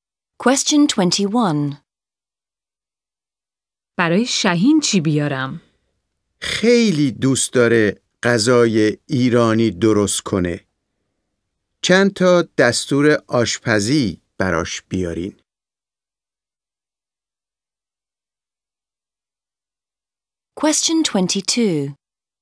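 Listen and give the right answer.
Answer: چند دستور آشپزی ایرانی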